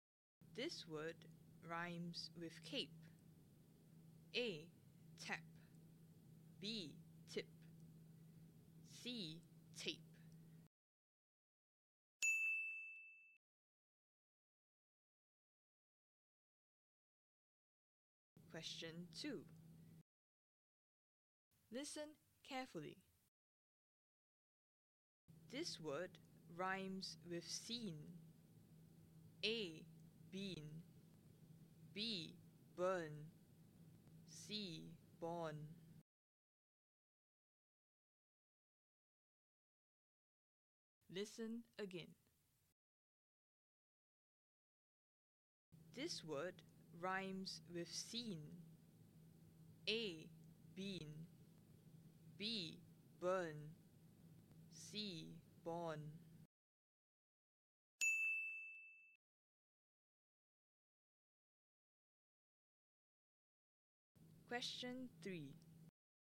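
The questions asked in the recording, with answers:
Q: This word rhymes with scene.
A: A: Bean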